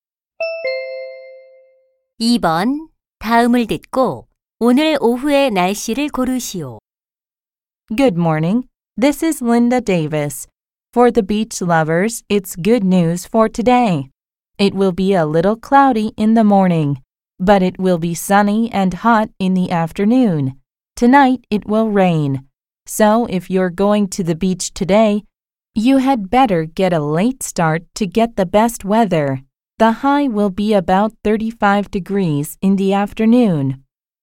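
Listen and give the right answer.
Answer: 맑고 더움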